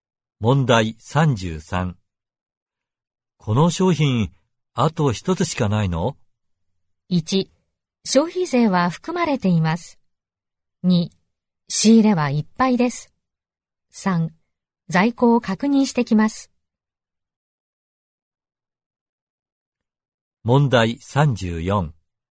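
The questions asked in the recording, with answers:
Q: この商品、あと一つしかないの?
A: 3: 在庫を確認してきます。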